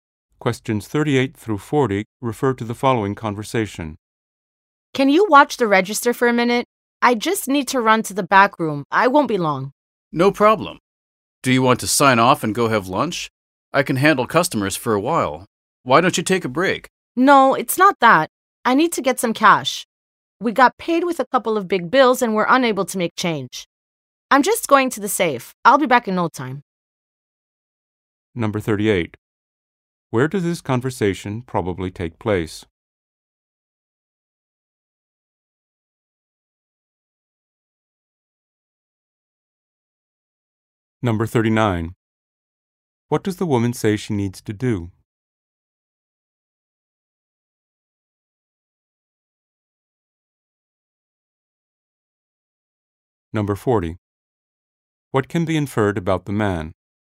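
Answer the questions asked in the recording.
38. In a store
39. Get cash from the safe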